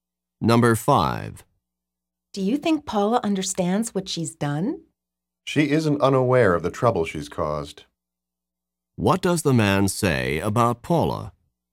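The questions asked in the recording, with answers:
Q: What does the man say about Paula?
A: She is aware of the trouble she caused.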